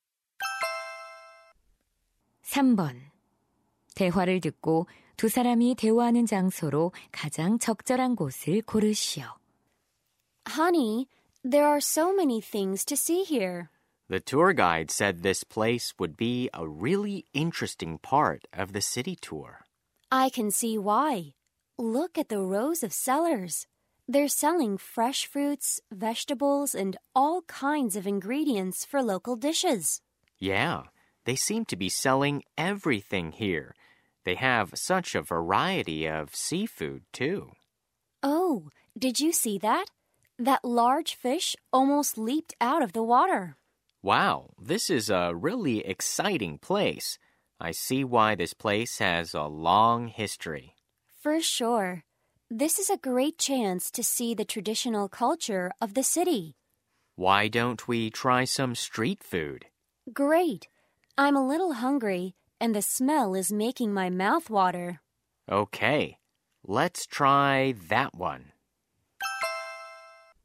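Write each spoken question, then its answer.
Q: 대화를 듣고 두 사람이 대화하는 장소로 가장 적절한 곳을 고르시오.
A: 전통 시장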